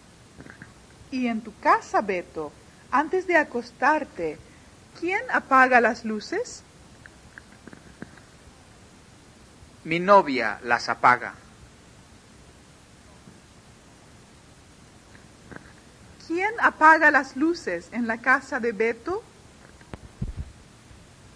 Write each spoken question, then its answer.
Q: ¿Quién apaga las luces en la casa de Beto?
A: La novia de Beto las apaga.